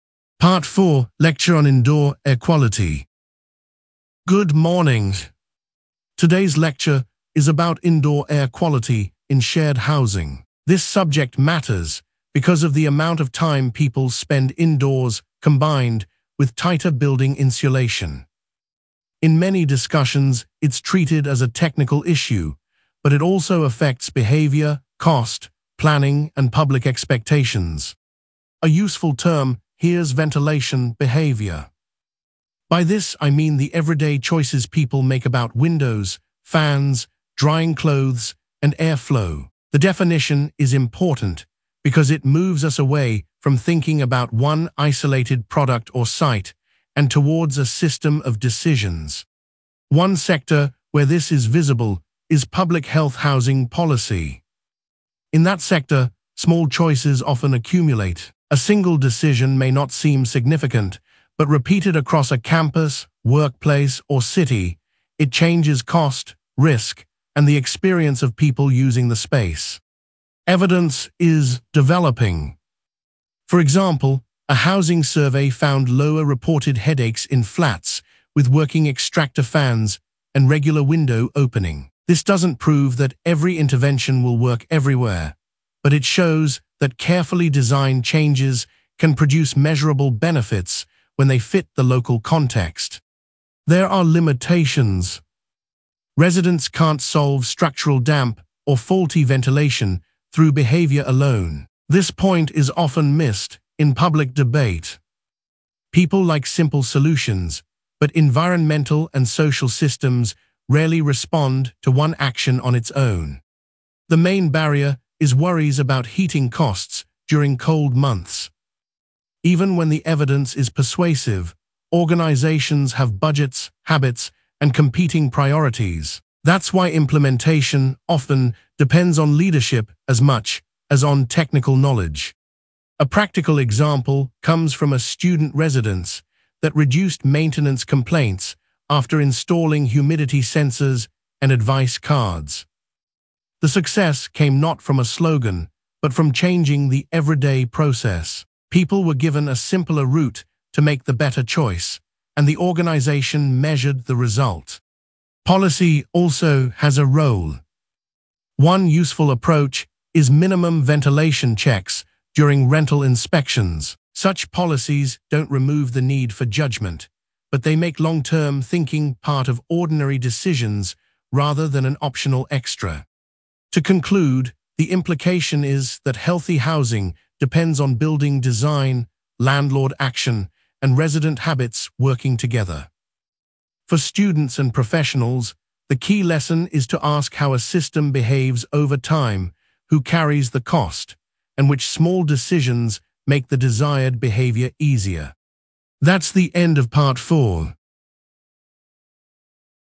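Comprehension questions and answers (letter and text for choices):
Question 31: What is the main topic of the lecture?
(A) indoor air quality in shared housing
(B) the history of public libraries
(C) language change in childhood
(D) international trade law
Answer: (A) indoor air quality in shared housing

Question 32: What primary cause or pressure does the lecturer mention?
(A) a fall in student numbers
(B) the cost of museum tickets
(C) the amount of time people spend indoors combined with tighter building insulation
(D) a lack of sports facilities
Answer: (C) the amount of time people spend indoors combined with tighter building insulation

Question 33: Which sector is used as an example?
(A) fashion retail only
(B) public health housing policy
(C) restaurant advertising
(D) private music tuition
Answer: (B) public health housing policy

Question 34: What does the term ventilation behaviour mean?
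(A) a short-term publicity campaign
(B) a law that bans all development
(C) a list of personal preferences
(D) the everyday choices people make about windows, fans, drying clothes, and air flow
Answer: (D) the everyday choices people make about windows, fans, drying clothes, and air flow

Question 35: What did the study or survey find?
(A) a housing survey found lower reported headaches in flats with working extractor fans and regular window opening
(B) no measurable result at all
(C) results only in one classroom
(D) a rise in international flights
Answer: (A) a housing survey found lower reported headaches in flats with working extractor fans and regular window opening

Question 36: What limitation does the lecturer mention?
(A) the topic has never been studied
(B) all users reject the idea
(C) residents cannot solve structural damp or faulty ventilation through behaviour alone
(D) it applies only to children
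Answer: (C) residents cannot solve structural damp or faulty ventilation through behaviour alone

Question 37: What is identified as the main barrier?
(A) lack of weather data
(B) worries about heating costs during cold months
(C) too many volunteers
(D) excessive classroom space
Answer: (B) worries about heating costs during cold months

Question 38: What practical example does the lecturer give?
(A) a school closing its library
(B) a cafe increasing plastic packaging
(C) a hospital cancelling training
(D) a student residence that reduced maintenance complaints after installing humidity sensors and advice cards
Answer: (D) a student residence that reduced maintenance complaints after installing humidity sensors and advice cards

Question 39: What policy approach is mentioned?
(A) minimum ventilation checks during rental inspections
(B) removing all inspection rules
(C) allowing only voluntary action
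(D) banning student research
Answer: (A) minimum ventilation checks during rental inspections

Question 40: What is the overall implication?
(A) short-term savings matter most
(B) technology can replace all staff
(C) healthy housing depends on building design, landlord action, and resident habits working together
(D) individual habits are irrelevant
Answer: (C) healthy housing depends on building design, landlord action, and resident habits working together

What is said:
Part 4: Lecture on Indoor Air Quality
Lecturer: Good morning. Today's lecture is about indoor air quality in shared housing. This subject matters because of the amount of time people spend indoors combined with tighter building insulation. In many discussions it is treated as a technical issue, but it also affects behaviour, cost, planning, and public expectations.
Lecturer: A useful term here is ventilation behaviour. 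By this I mean the everyday choices people make about windows, fans, drying clothes, and air flow. The definition is important because it moves us away from thinking about one isolated product or site and towards a system of decisions.
Lecturer: One sector where this is visible is public health housing policy. In that sector, small choices often accumulate. A single decision may not seem significant, but repeated across a campus, workplace, or city, it changes cost, risk, and the experience of people using the space.
Lecturer: Evidence is developing. For example, a housing survey found lower reported headaches in flats with working extractor fans and regular window opening. This does not prove that every intervention will work everywhere, but it shows that carefully designed changes can produce measurable benefits when they fit the local context.
Lecturer: There are limitations. This point is often missed in public debate. 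People like simple solutions, but environmental and social systems rarely respond to one action on its own.
Lecturer: The main barrier is worries about heating costs during cold months. Even when the evidence is persuasive, organisations have budgets, habits, and competing priorities. That is why implementation often depends on leadership as much as on technical knowledge.
Lecturer: A practical example comes from a student residence that reduced maintenance complaints after installing humidity sensors and advice cards. The success came not from a slogan, but from changing the everyday process. People were given a simpler route to make the better choice, and the organisation measured the result.
Lecturer: Policy also has a role. One useful approach is minimum ventilation checks during rental inspections. Such policies do not remove the need for judgement, but they make long-term thinking part of ordinary decisions rather than an optional extra.
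Lecturer: To conclude, the implication is that healthy housing depends on building design, landlord action, and resident habits working together. For students and professionals, the key lesson is to ask how a system behaves over time, who carries the cost, and which small decisions make the desired behaviour easier.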